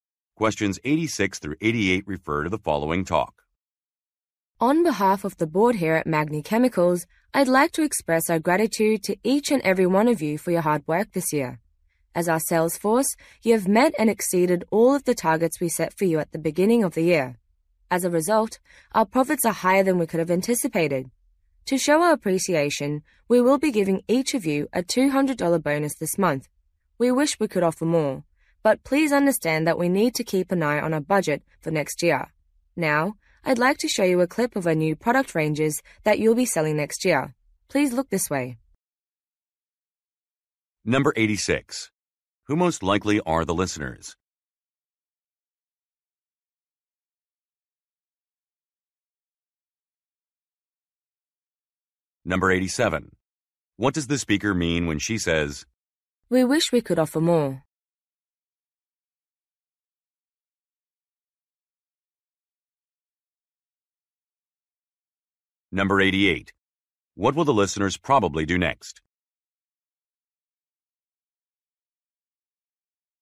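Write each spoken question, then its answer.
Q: Who most likely are the listeners?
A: Sales staff

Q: What does the speaker mean when she says,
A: The budget is limited

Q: What will the listeners probably do next?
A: Watch a video clip of new products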